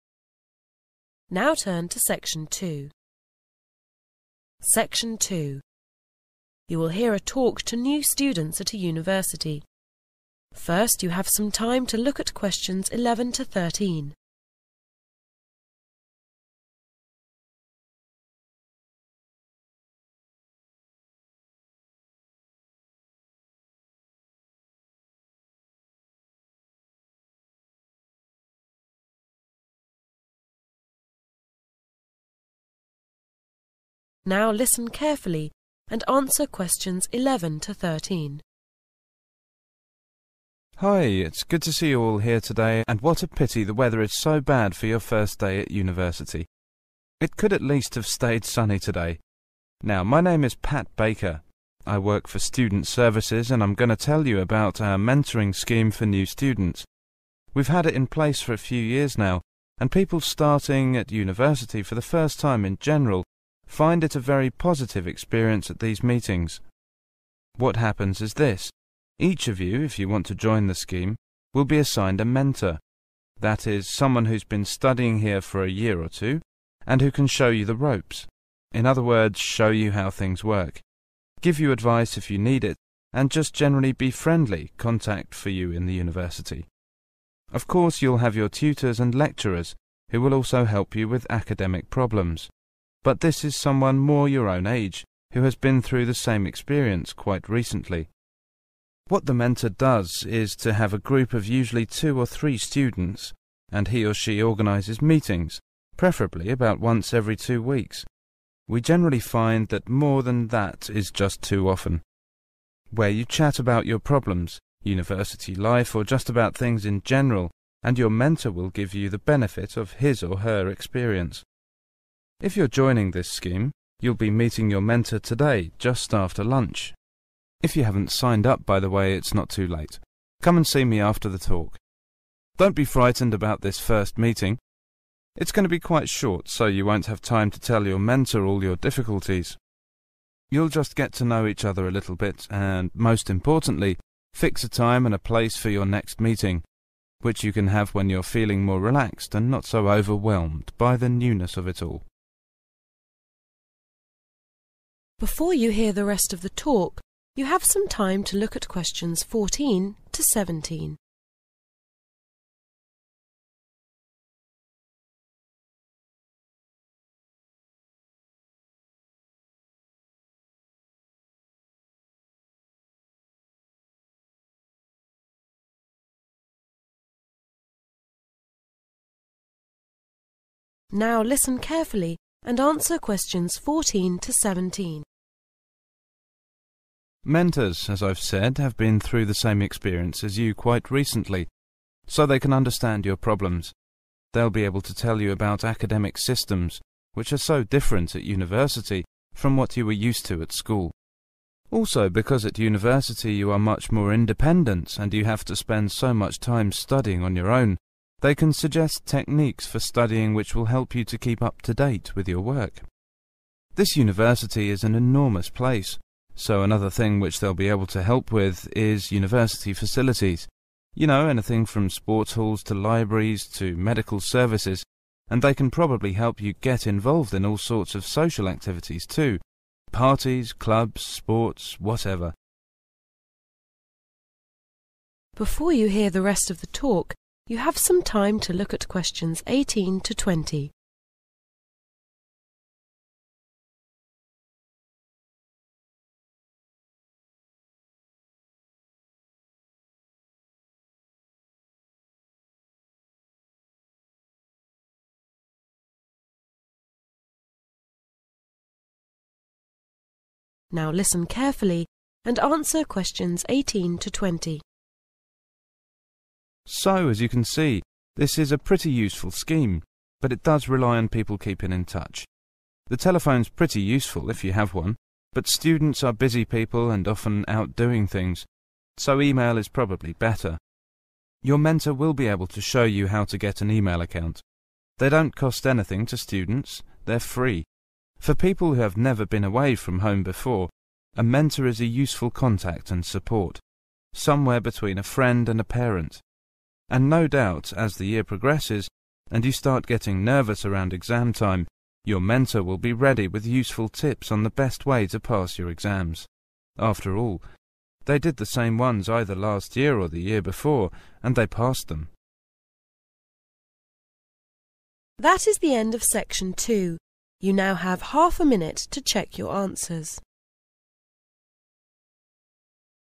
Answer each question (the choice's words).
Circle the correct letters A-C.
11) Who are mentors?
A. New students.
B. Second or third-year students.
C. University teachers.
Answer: Second or third-year students.

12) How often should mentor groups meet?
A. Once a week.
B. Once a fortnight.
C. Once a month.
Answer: Once a fortnight.

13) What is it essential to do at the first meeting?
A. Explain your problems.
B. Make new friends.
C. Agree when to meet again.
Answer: Agree when to meet again.

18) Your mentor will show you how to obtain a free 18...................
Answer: e-mail account

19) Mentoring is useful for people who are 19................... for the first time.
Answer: away from home

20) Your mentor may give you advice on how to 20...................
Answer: pass (your) exams